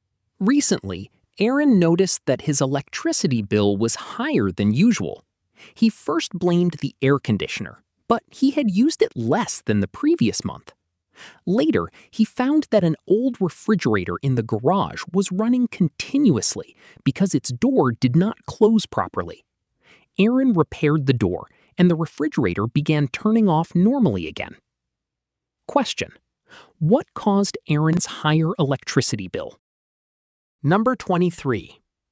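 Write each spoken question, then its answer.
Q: what caused Aaron's higher electricity bill?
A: An old refrigerator running continuously because its door didn't close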